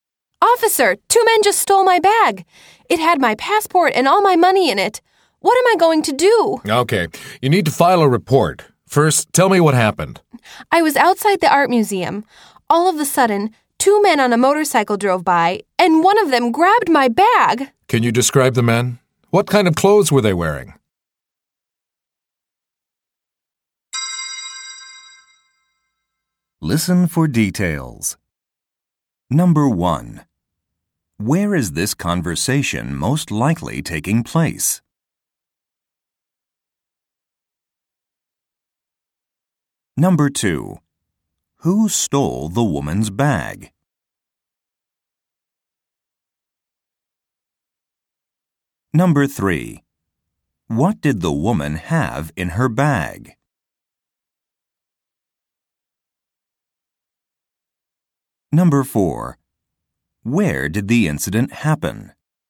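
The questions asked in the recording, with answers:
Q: Who stole the woman's bag?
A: Two men on a motorcycle

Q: What did the woman have in her bag?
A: Her passport and all her money

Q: Where did the incident happen?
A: Outside the art museum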